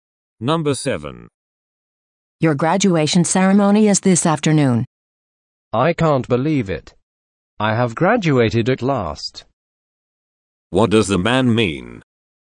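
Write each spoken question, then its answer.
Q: What does the man mean?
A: He is happy that he is finally graduating.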